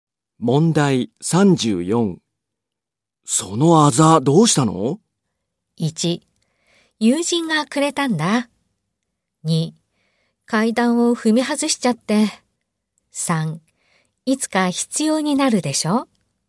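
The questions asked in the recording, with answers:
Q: そのあざどうしたの?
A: 2: 階段を踏み外しちゃって。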